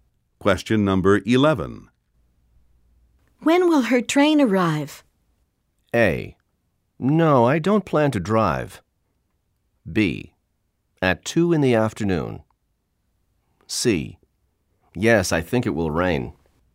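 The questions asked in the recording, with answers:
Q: When will her train arrive?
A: B: At 2 in the afternoon.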